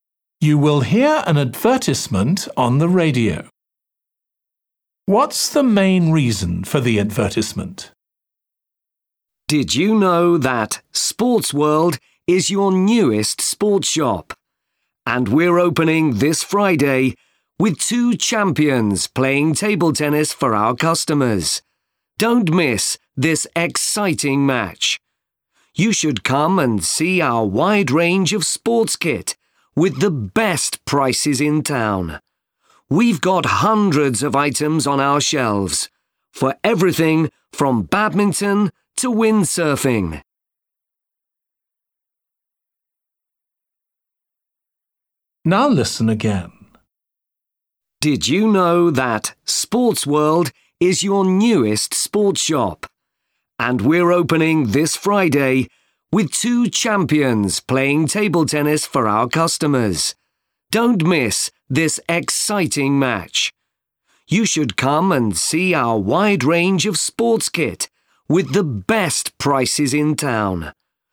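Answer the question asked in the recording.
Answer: To announce the opening of a new sports shop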